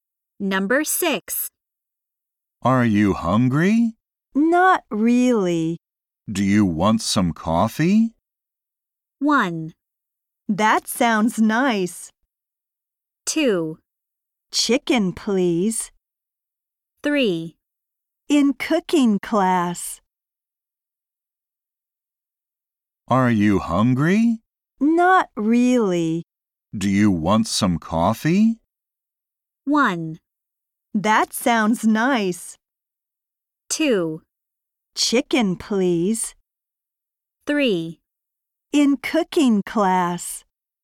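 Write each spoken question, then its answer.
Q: Do you want some coffee?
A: 1: That sounds nice.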